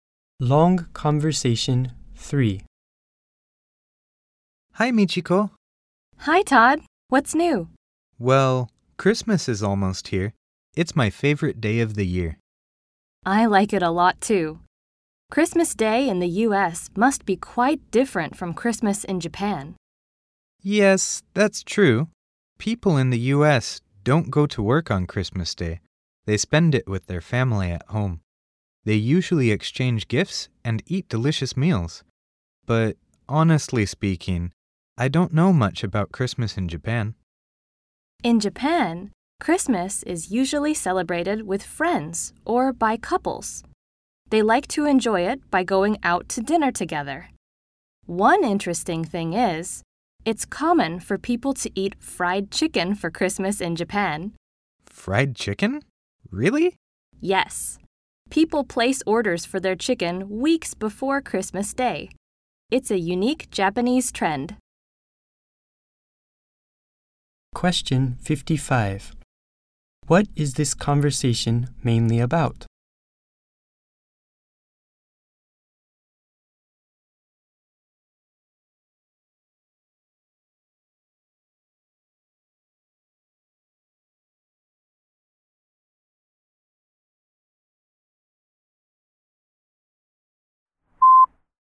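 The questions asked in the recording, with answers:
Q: What is this conversation mainly about?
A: How Christmas is celebrated differently in the U.S. and Japan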